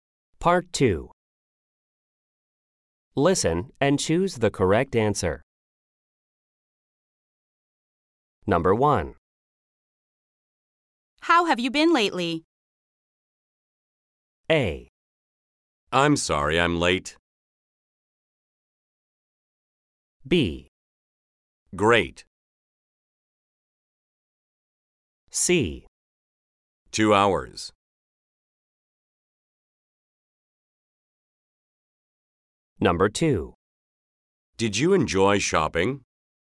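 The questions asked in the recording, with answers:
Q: How have you been lately?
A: B: Great.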